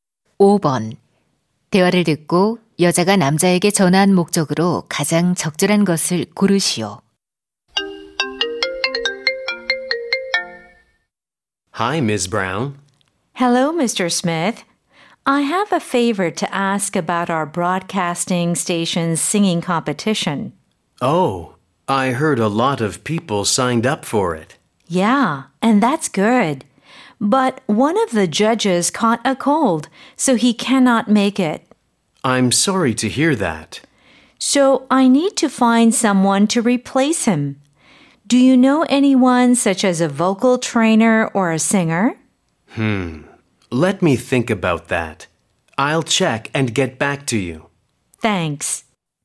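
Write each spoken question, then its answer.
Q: 대화를 듣고 여자가 남자에게 전한 목적으로 가장 적절한 것을 고르시오.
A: 노래 대회의 대체 심사위원을 찾아 달라고 부탁하려고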